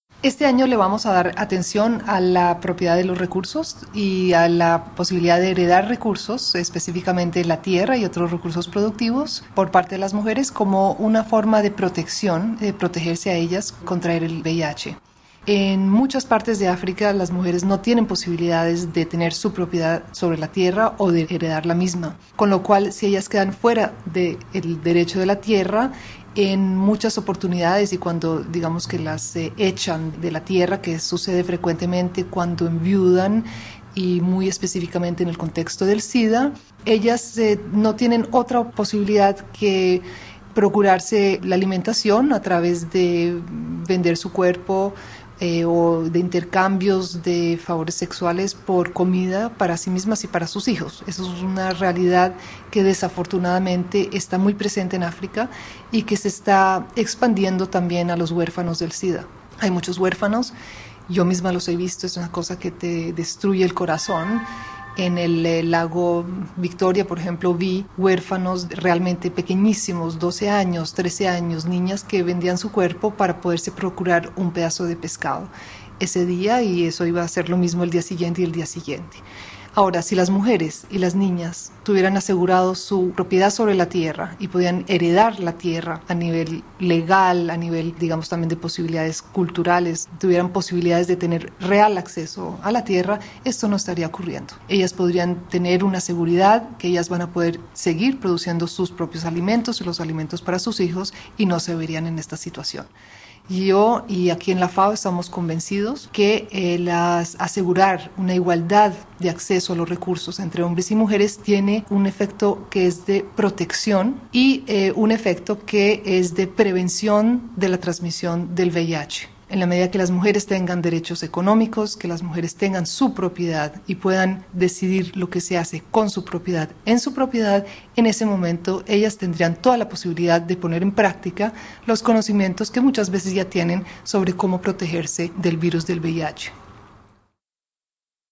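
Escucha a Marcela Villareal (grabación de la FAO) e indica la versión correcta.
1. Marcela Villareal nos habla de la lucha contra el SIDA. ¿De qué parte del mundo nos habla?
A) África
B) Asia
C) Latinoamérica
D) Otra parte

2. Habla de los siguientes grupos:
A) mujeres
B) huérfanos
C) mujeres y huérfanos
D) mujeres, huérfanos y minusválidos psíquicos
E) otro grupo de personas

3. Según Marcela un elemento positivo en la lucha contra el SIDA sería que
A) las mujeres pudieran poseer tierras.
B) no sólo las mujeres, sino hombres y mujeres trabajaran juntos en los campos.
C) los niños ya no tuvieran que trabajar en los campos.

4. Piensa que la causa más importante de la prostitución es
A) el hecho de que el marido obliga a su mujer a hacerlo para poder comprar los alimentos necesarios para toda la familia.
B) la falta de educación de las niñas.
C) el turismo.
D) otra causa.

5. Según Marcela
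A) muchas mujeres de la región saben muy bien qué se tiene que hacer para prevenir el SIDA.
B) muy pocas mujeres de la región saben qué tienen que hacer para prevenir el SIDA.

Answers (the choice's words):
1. África
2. mujeres y huérfanos
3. las mujeres pudieran poseer tierras.
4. otra causa.
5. muchas mujeres de la región saben muy bien qué se tiene que hacer para prevenir el SIDA.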